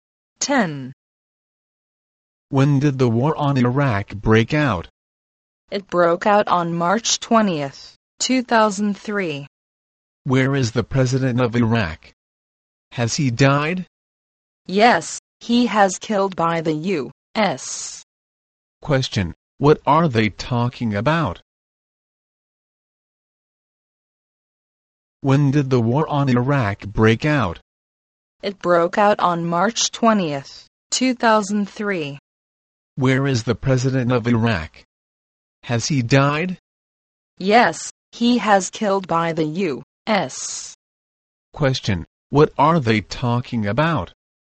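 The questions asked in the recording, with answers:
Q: Question, what are they talking about?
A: The war on Iraq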